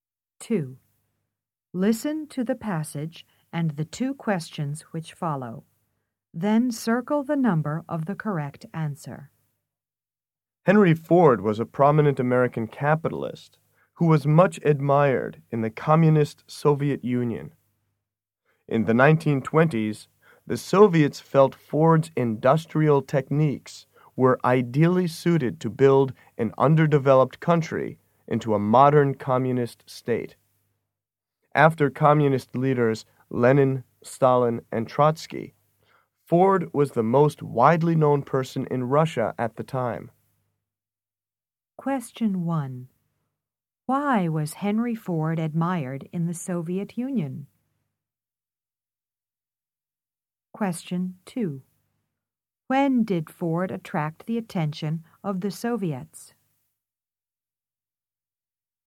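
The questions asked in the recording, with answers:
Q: Why was Henry Ford admired in the Soviet Union?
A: His industrial techniques were seen as ideal for building the country into a modern communist state

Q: When did Ford attract the attention of the Soviets?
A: In the 1920s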